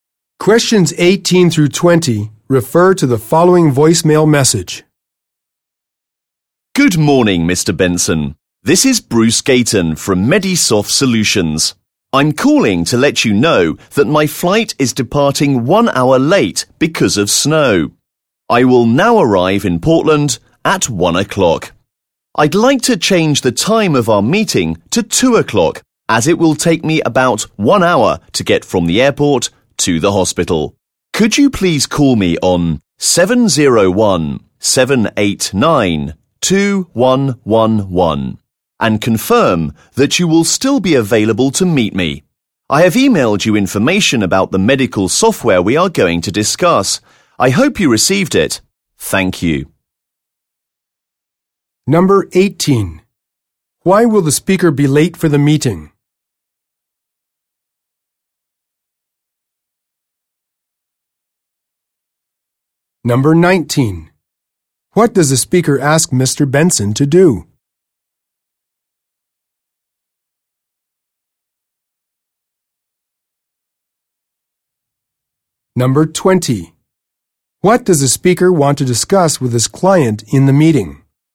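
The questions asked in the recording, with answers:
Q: Why will the speaker be late for the meeting?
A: His flight is delayed because of snow

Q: What does the speaker want to discuss with his client in the meeting?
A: Medical software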